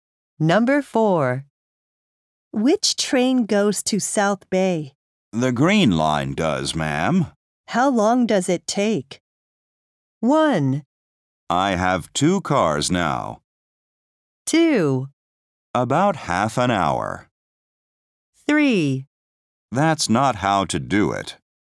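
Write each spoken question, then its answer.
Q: How long does it take?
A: 2: About half an hour.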